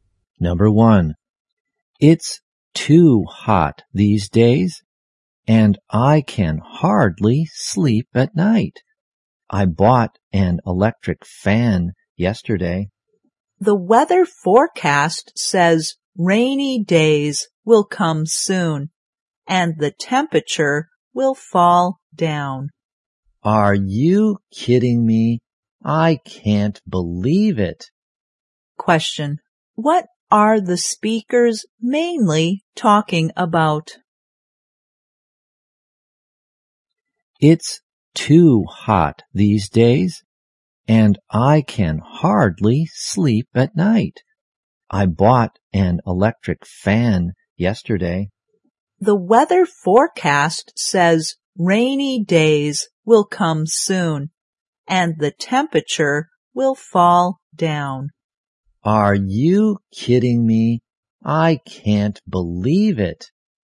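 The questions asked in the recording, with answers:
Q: Question. What are the speakers mainly talking about?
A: The weather.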